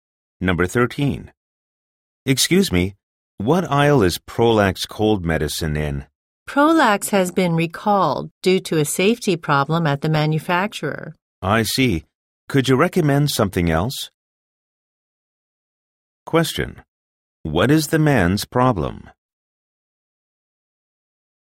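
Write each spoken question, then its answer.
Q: What is the man's problem?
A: The medicine he wants has been recalled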